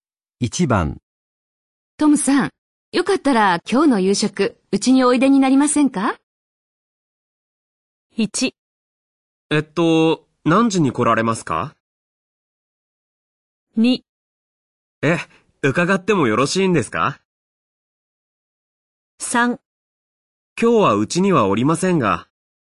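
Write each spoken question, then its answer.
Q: トムさん、よかったら今日の夕食、うちにおいでになりませんか?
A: 2: 伺ってもよろしいんですか?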